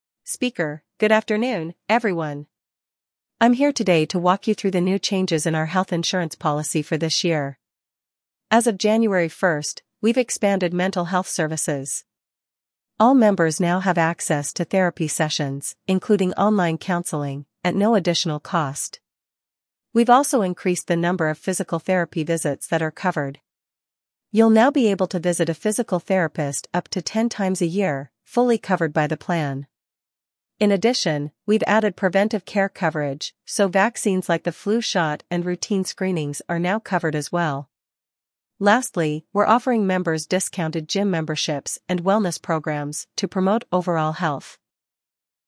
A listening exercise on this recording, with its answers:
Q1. What is the main change in the health insurance policy?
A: Expanded mental health services

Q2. What type of services are now included in the policy at no additional cost?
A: Therapy sessions

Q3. How many physical therapy visits are now covered by the plan?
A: Ten visits

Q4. What preventive care is now covered by the insurance?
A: Vaccines and routine screenings

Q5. What new benefit is offered to members?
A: Discounts on gym memberships and wellness programs

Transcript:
Speaker: "Good afternoon, everyone! I'm here today to walk you through the new changes in our health insurance policy for this year. As of January 1st, we've expanded mental health services. All members now have access to therapy sessions, including online counseling, at no additional cost. We've also increased the number of physical therapy visits that are covered. You'll now be able to visit a physical therapist up to ten times a year, fully covered by the plan. In addition, we've added preventive care coverage, so vaccines like the flu shot and routine screenings are now covered as well. Lastly, we're offering members discounted gym memberships and wellness programs to promote overall health."